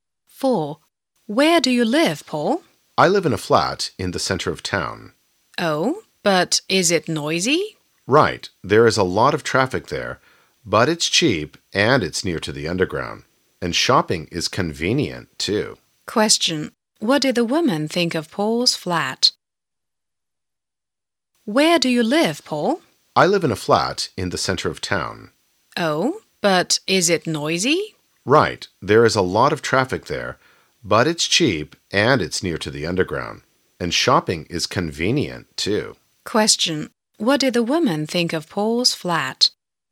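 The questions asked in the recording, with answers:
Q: What did the woman think of Paul's flat?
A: It is noisy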